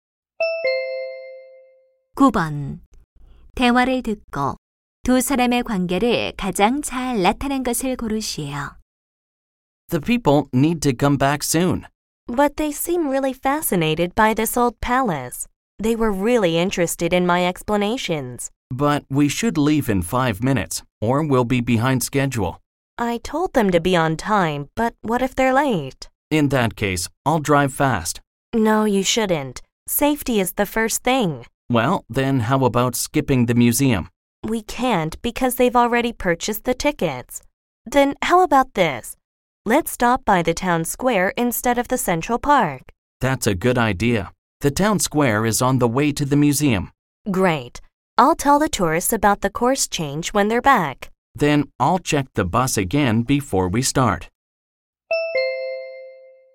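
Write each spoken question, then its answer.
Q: 대화를 듣고 두 사람의 관계를 가장 잘 나타낸 것을 고르시오.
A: 관광 가이드 - 버스 기사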